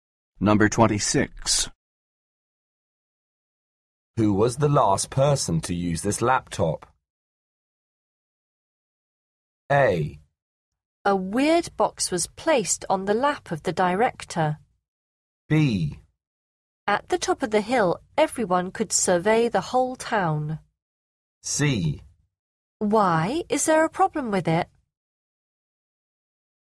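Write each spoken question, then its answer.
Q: Who was the last person to use this laptop?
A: C: Why? Is there a problem with it?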